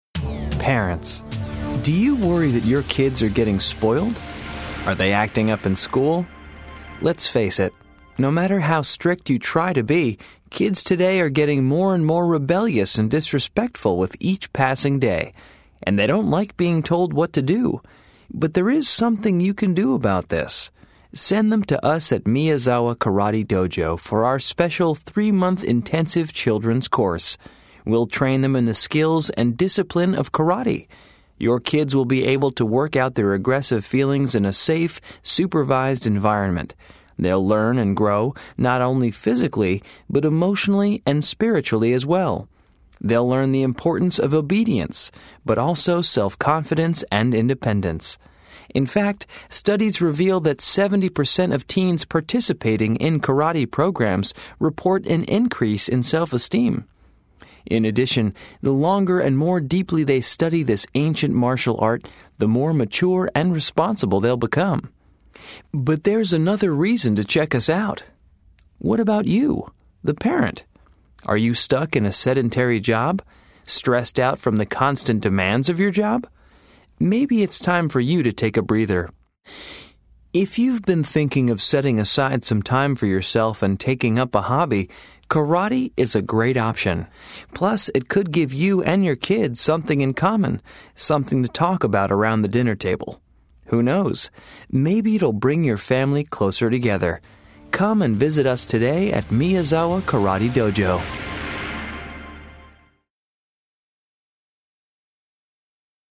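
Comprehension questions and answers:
Listen to the radio advertisement. Then choose all the correct answers.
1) According to the advertisement, karate would be good for kids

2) According to the advertisement, the karate course will help children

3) The advertisement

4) According to the advertisement, the karate course would also be beneficial for adults who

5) The advertisement claims that the karate course can give families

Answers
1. who are spoiled, rebellious, disrespectful or acting up in school
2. work out aggressive feelings and gain obedience, self-confidence, independence and maturity
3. says 70% of teens in karate programs report higher self-esteem
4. have sedentary, stressful jobs and want to take up a hobby
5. something in common to talk about and bring them closer together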